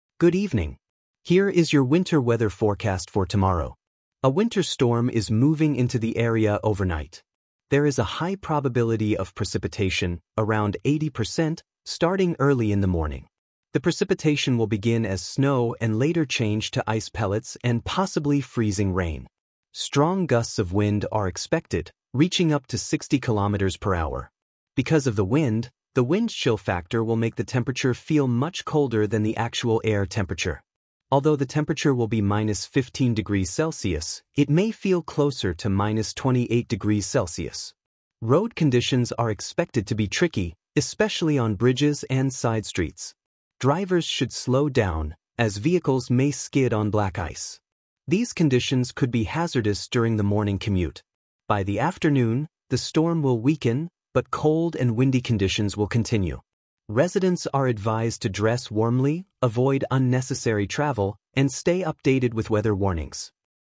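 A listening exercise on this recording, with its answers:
Write True (T) or False (F). Correct the false ones.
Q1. The storm will begin in the afternoon.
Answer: False

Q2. The probability of precipitation is low.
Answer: False

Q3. Snow will change into ice pellets later.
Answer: True

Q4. Wind gusts may reach 60 km/h.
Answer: True

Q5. The wind chill will make it feel warmer than −15°C.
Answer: False

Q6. Roads will be slippery during the morning commute.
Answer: True

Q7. Cars can skid in icy conditions.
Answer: True

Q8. The storm will become stronger in the afternoon.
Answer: False

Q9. The wind and cold weather will continue.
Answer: True

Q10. People are advised to avoid unnecessary travel.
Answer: True

II. Answer the following questions. Use complete sentences:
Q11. What kind of weather system is coming overnight?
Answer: A winter storm is moving into the area overnight.

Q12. 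What is the probability of precipitation?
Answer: It is high, around 80%.

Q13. What type of precipitation will happen first?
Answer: Snow will come first.

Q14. What will the snow change into later?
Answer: It will change to ice pellets and possibly freezing rain.

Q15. How strong will the wind gusts be?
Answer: They will reach up to 60 km per hour.

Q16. What will the wind chill factor make the temperature feel like?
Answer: It will feel close to minus 28 degrees Celsius.

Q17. Why will the weather feel colder than −15°C?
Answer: Because of the wind (the wind chill factor).

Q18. Which places will be especially slippery?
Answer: Bridges and side streets.

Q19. What problem might drivers experience on the roads?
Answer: Vehicles may skid on black ice.

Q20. What advice is given to residents?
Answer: Dress warmly, avoid unnecessary travel, and stay updated with weather warnings.

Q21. Explain how the wind will weaken later.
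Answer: The storm will weaken by the afternoon, but cold and windy conditions will continue.

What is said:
The Weather Forecast
Good evening. Here is your winter weather forecast for tomorrow.
A winter storm is moving into the area overnight. There is a high probability of precipitation, around 80%, starting early in the morning. The precipitation will begin as snow and later change to ice pellets and possibly freezing rain.
Strong gusts of wind are expected, reaching up to 60 km/h. Because of the wind, the wind chill factor will make the temperature feel much colder than the actual air temperature. Although the temperature will be −15°C, it may feel closer to −28°C.
Road conditions are expected to be tricky, especially on bridges and side streets. Drivers should slow down, as vehicles may skid on black ice. These conditions could be hazardous during the morning commute.
By the afternoon, the storm will weaken, but cold and windy conditions will continue. 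Residents are advised to dress warmly, avoid unnecessary travel, and stay updated with weather warnings.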